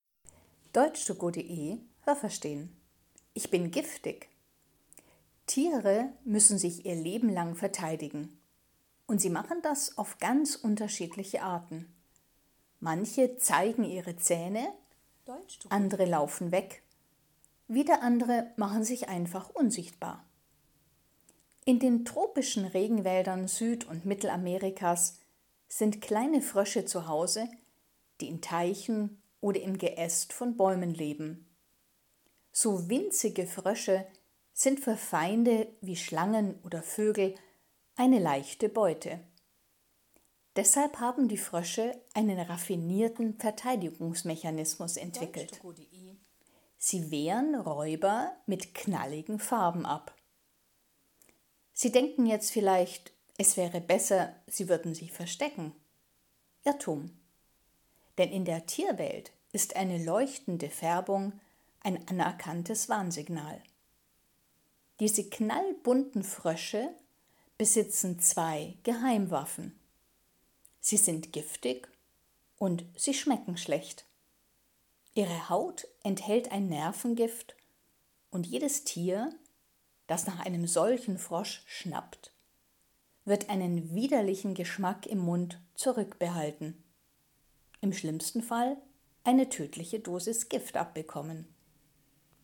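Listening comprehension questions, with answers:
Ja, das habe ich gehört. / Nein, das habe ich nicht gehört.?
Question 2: Die kleinen Frösche in Süd- und Mittelamerika leben vor allem in den Ästen von Eichen.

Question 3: Schlangen können kleine Frösche normalerweise problemlos fangen.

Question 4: Eine leuchtende Farbe ist in der Natur ein Irrtum.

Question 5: Die Frösche warnen mit ihrer Farbe die Tierwelt, aber es wäre besser, wenn sie sich außerdem verstecken würden.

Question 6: Die Frösche schmecken eklig.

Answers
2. Nein, das habe ich nicht gehört.
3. Ja, das habe ich gehört.
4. Nein, das habe ich nicht gehört.
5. Nein, das habe ich nicht gehört.
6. Ja, das habe ich gehört.

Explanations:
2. Sie leben in Teichen (das sind kleine Seen) oder im Geäst von Bäumen.
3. Sie sind „eine leichte Beute" für Schlangen.
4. Das ist kein Irrtum, sondern ein anerkanntes Warnsignal im Tierreich.

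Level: B2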